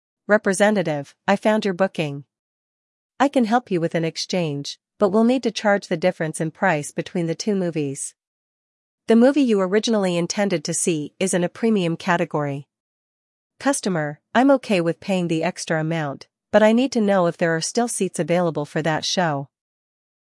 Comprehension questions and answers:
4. What is the customer willing to do to resolve the issue?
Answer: The customer is willing to pay the price difference.

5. Why is there a difference in price between the two movies?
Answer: The movie the customer wanted to see is in a premium category.

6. What does the customer ask about availability?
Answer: The customer asks if there are still seats available.

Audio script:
Representative: I found your booking. I can help you with an exchange, but we'll need to charge the difference in price between the two movies. The movie you originally intended to see is in a premium category.
Customer: I'm okay with paying the extra amount, but I need to know if there are still seats available for that show.